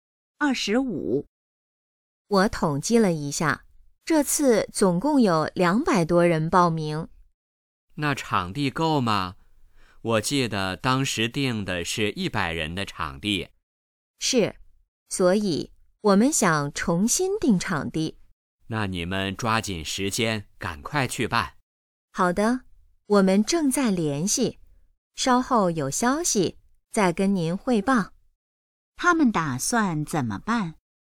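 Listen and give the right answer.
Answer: 重新定场地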